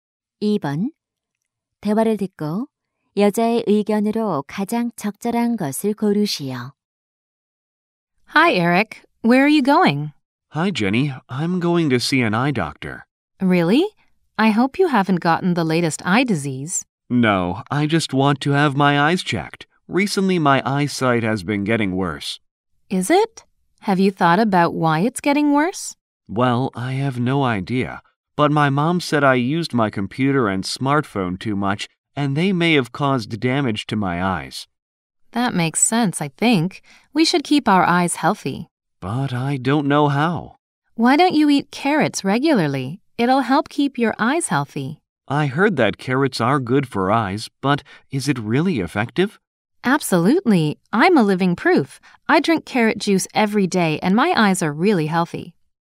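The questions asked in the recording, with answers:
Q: 대화를 듣고 여자의 의견으로 가장 적절한 것을 고르시오.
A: 당근을 규칙적으로 먹으면 눈 건강에 좋다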